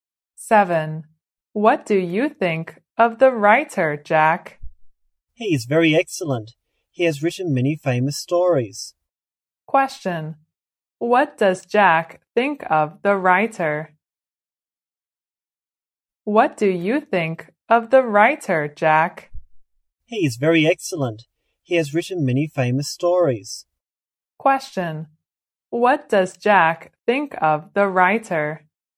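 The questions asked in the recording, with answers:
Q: What does Jack think of the writer?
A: He is very excellent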